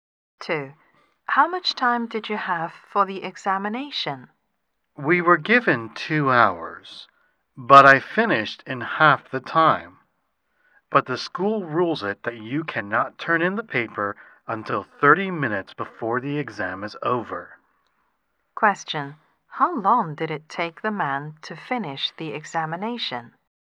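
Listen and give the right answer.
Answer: One hour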